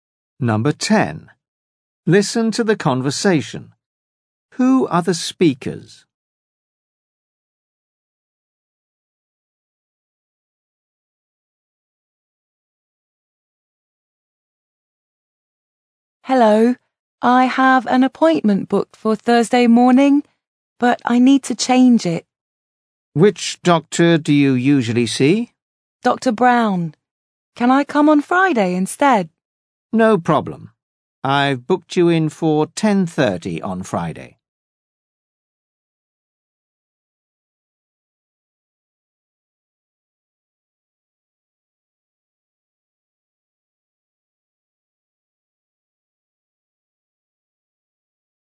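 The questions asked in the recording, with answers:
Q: Who are the speakers?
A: A patient and a doctor's receptionist.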